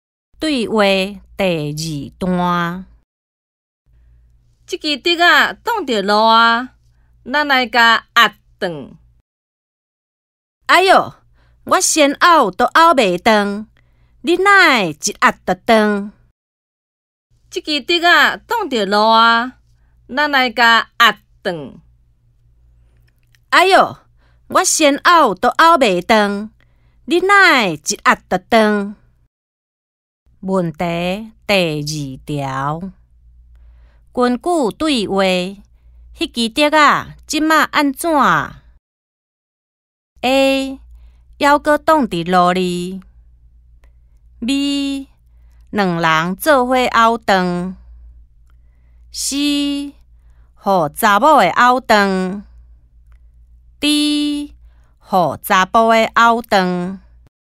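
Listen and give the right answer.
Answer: D: 互查甫的拗断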